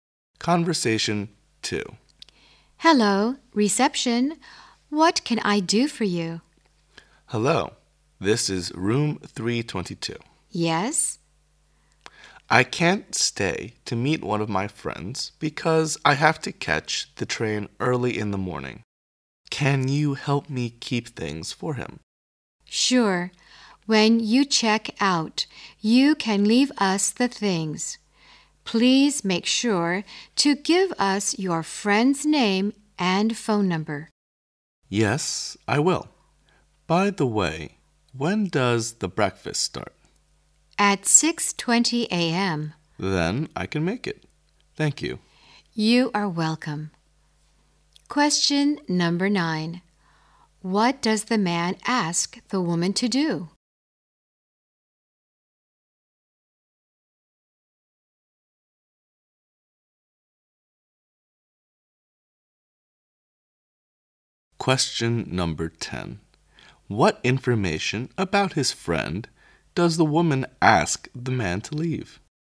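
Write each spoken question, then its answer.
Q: What does the man ask the woman to do?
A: Keep things for his friend

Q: What information about his friend does the woman ask the man to leave?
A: His friend's name and phone number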